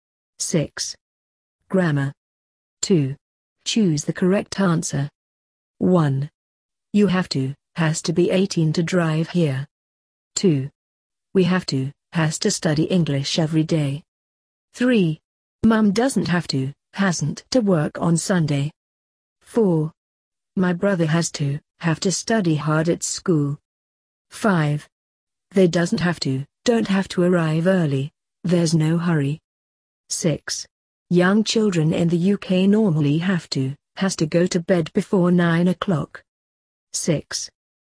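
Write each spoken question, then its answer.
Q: 1. You have to, has to be 18 to drive here.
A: have to

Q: 2. We have to, has to study English every day.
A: have to

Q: 3. Mum doesn't have to, hasn't to work on Sunday.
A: doesn't have to

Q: 4. My brother has to, have to study hard at school.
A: has to

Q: 5. They doesn't have to, don't have to arrive early, there's no hurry.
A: don't have to

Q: 6. Young children in the UK normally have to, has to go to bed before 9 o'clock.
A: have to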